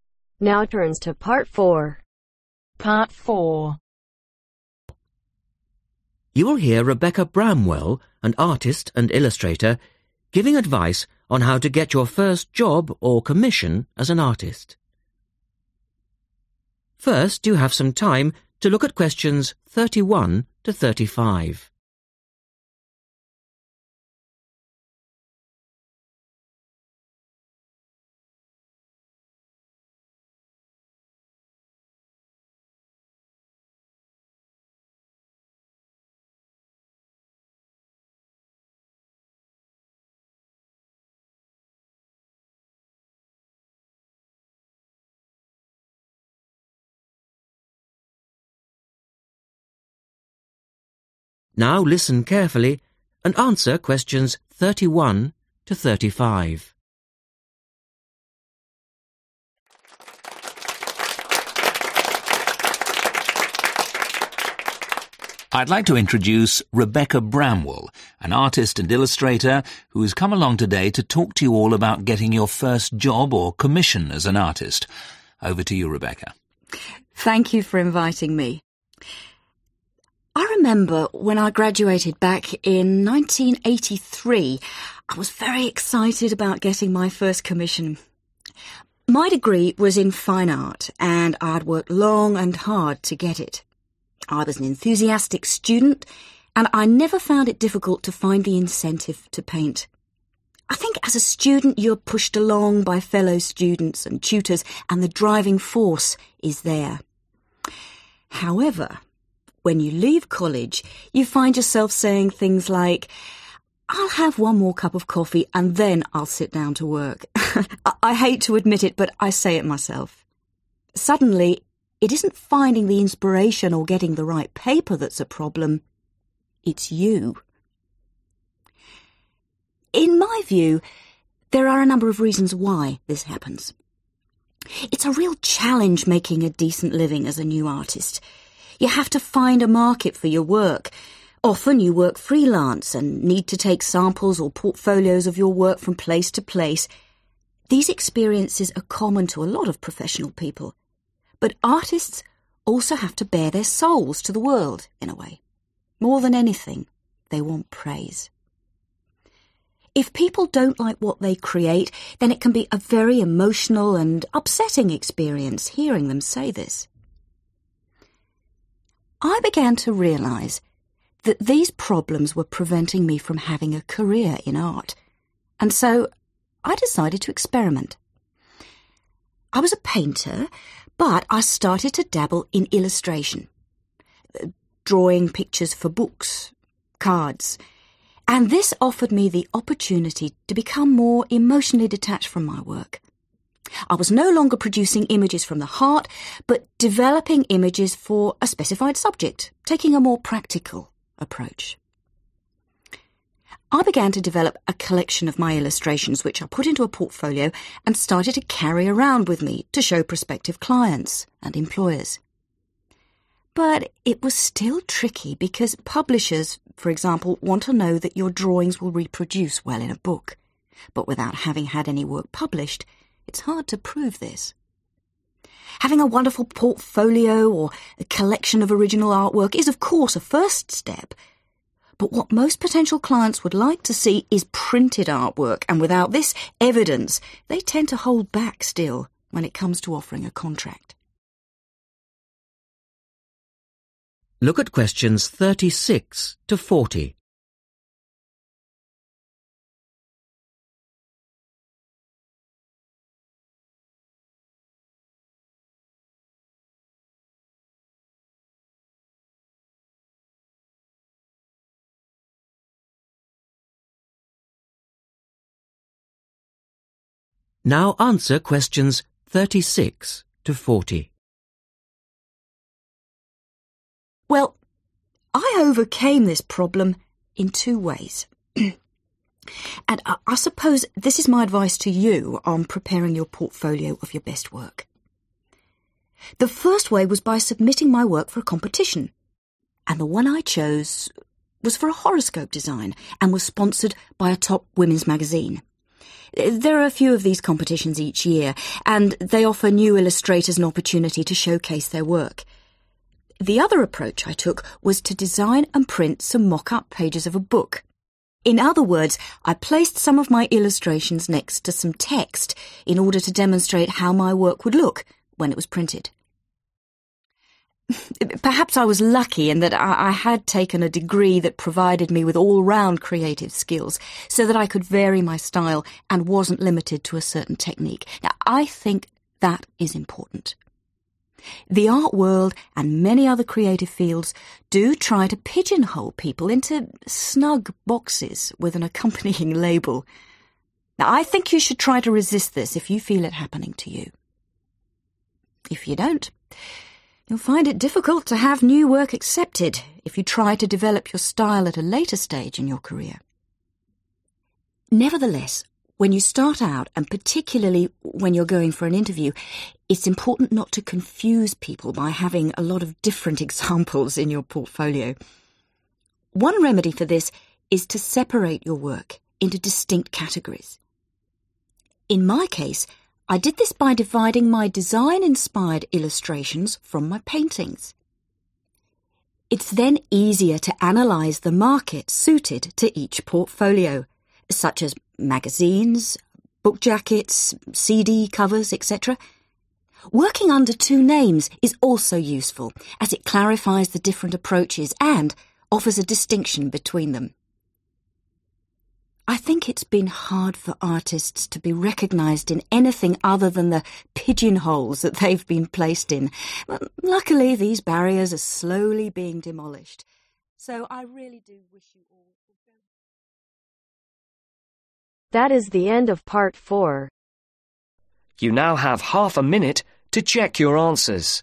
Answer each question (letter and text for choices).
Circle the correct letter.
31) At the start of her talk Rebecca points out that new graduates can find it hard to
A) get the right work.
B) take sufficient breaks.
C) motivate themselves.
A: C) motivate themselves.

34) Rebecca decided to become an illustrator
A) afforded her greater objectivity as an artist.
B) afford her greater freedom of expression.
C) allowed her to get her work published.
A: A) afforded her greater objectivity as an artist.

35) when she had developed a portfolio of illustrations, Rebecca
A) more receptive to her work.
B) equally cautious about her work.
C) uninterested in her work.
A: B) equally cautious about her work.

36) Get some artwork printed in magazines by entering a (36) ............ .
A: competition(s)

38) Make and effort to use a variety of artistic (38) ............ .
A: styles/techniques

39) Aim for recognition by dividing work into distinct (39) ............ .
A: categories

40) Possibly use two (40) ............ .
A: names